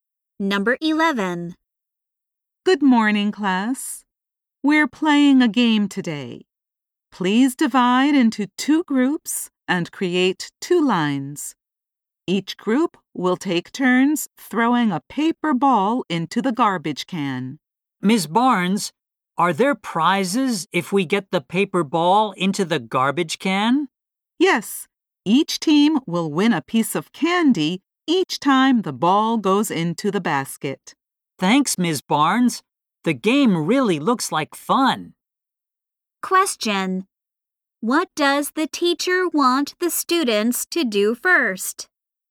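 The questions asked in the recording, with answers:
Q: What does the teacher want the students to do first?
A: Divide into two groups and make two lines.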